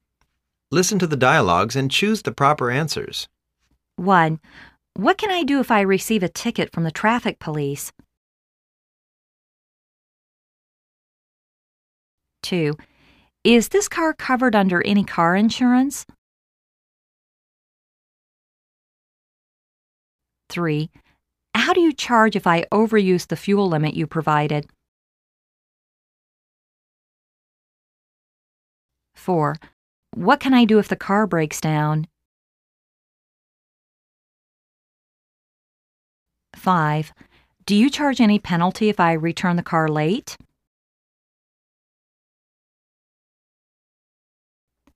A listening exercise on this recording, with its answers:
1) What can I do if I receive a ticket from the traffic police?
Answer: You should bring the ticket back here. We'II deal with it.

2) Is this car covered under any car insurance?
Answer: Yes, it is.

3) How do you charge if I over use the fuel limit you provided?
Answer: We usually charge 0.5 US dollars per kilometer.

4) What can I do if the car breaks down?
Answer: Call our service line 0800 966-1234.

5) Do you charge any penalty if I return the car late?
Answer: Within one hour late we won't charge any penalty.